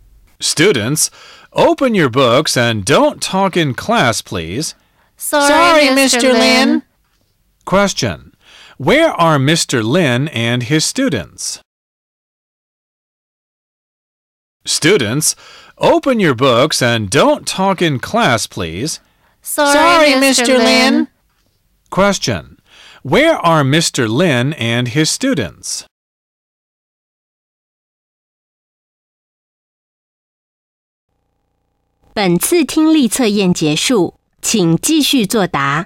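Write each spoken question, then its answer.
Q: Where are Mr. Lin and his students?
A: In a classroom.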